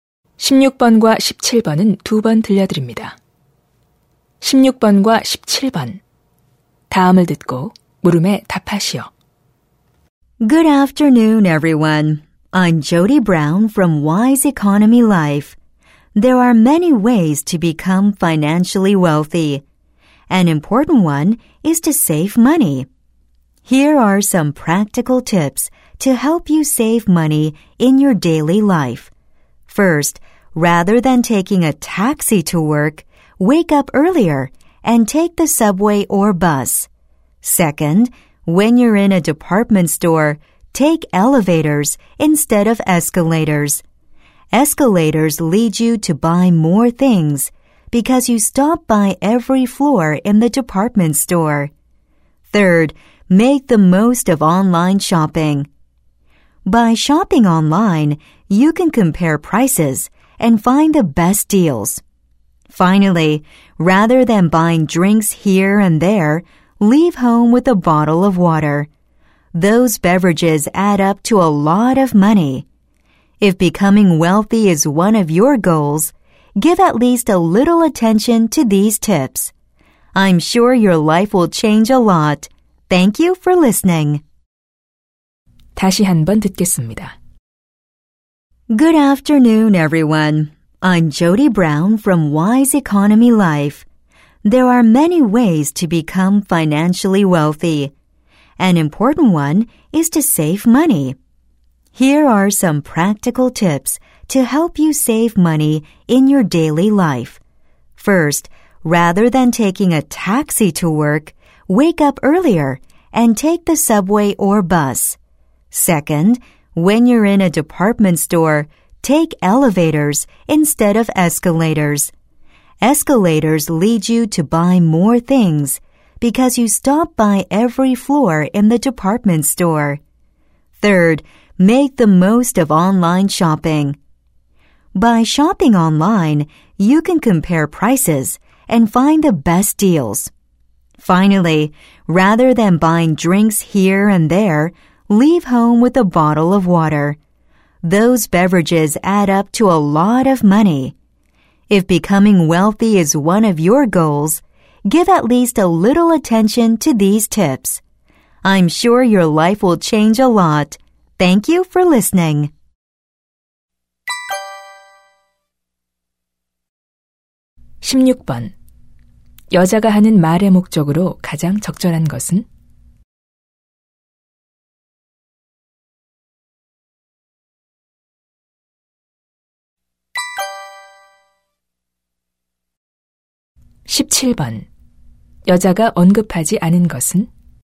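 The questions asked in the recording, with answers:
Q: 여자가 하는 말의 목적으로 가장 적절한 것은?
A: 일상생활에서 돈을 절약하는 방법을 알려 주려고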